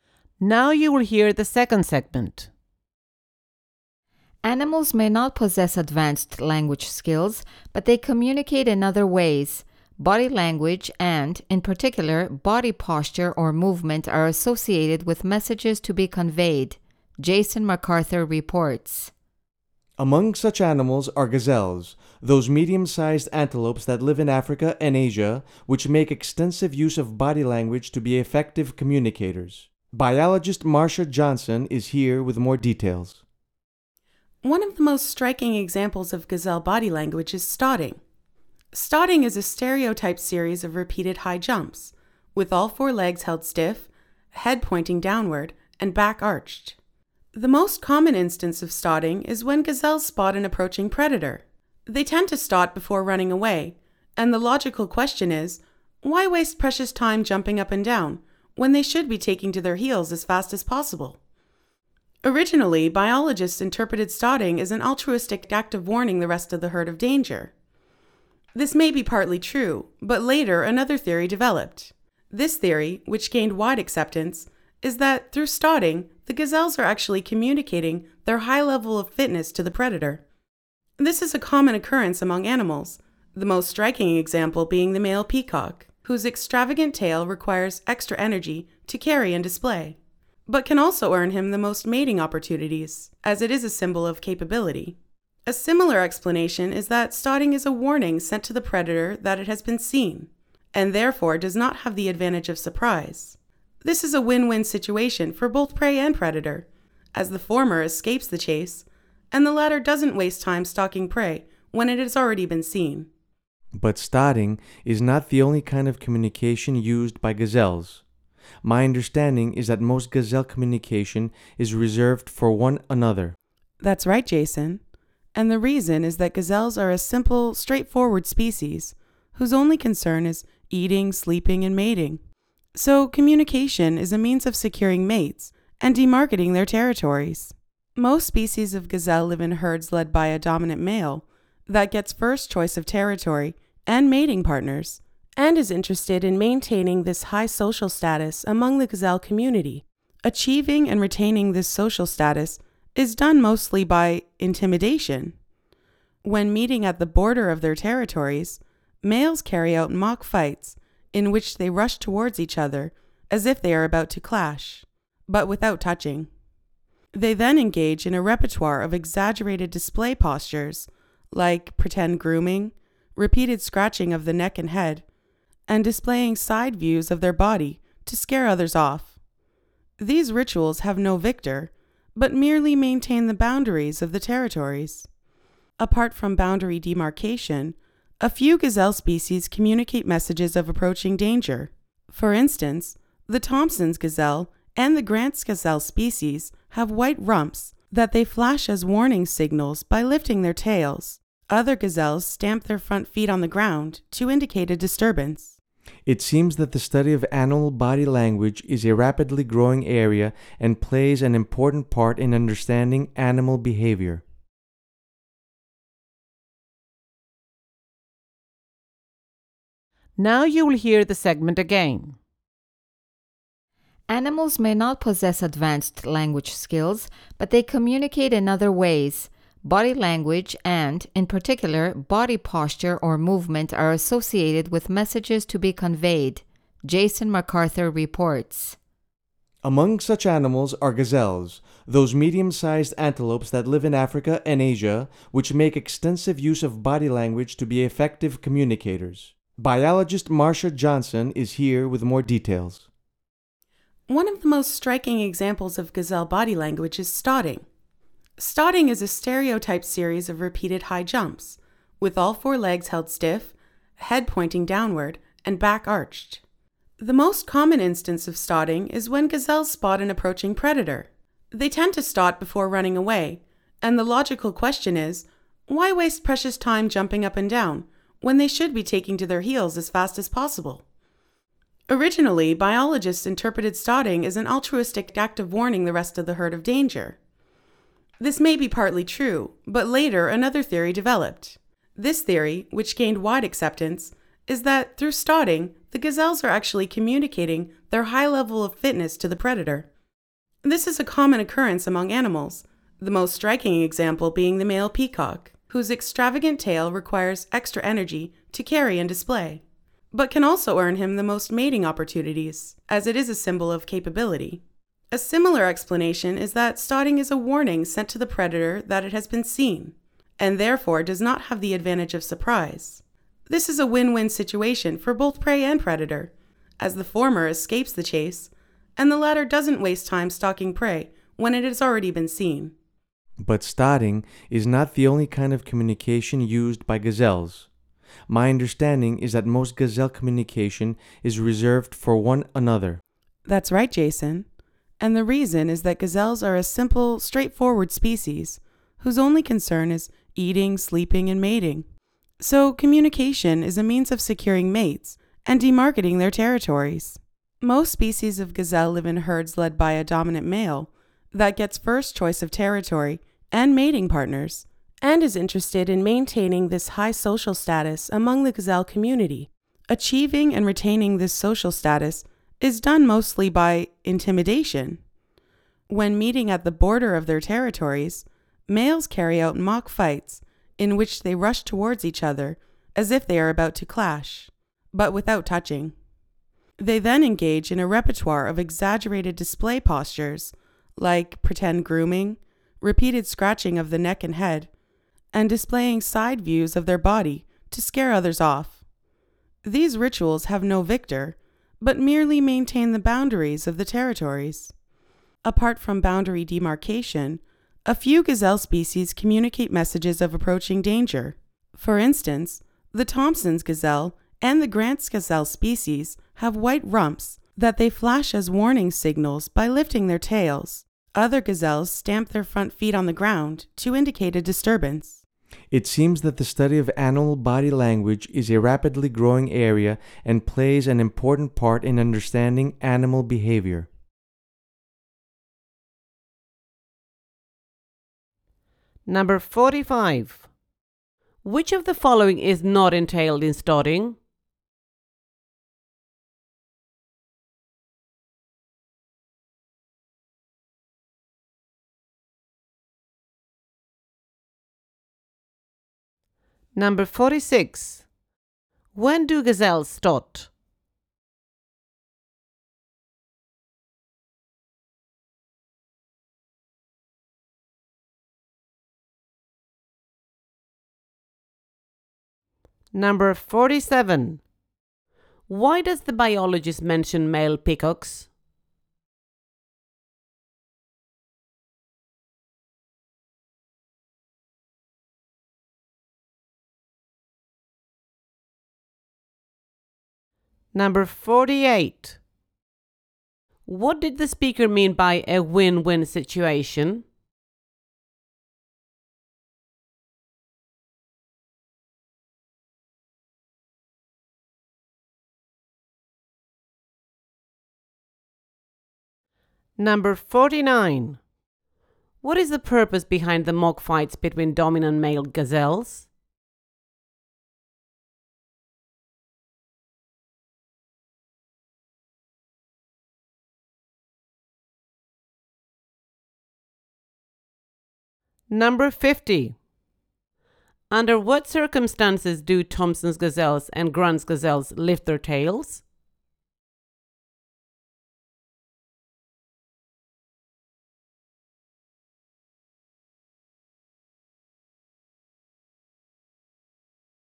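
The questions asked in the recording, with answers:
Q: When do gazelles stot?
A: When they spot an approaching predator

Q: Why does the biologist mention male peacocks?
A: As an example of an animal showing its high fitness through a costly display

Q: What did the speaker mean by a win-win situation?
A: The prey escapes the chase, and the predator does not waste time stalking prey that has already seen it

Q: What is the purpose behind the mock fights between dominant male gazelles?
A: To keep the boundaries of their territories (and their social status)

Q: Under what circumstances do Thompson's gazelles and Grant's gazelles lift their tails?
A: To warn of approaching danger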